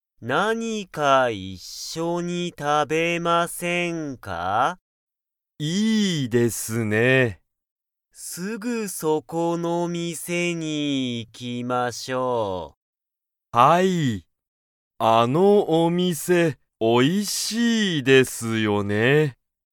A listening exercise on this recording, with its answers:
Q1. 木村(きむら)さんと安藤(あんどう)さんは、____の店(みせ)に行(い)く。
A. すぐそこ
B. 何(なに)か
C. 本当ほんとう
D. 今度(こんど)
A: A. すぐそこ

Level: Level 1

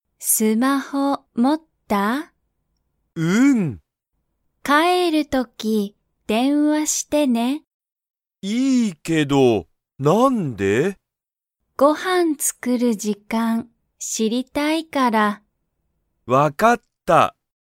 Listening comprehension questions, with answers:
タケシは、帰(かえ)る時(とき)、電話(でんわ)しますか?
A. はい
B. いいえ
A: A. はい

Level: Level 1

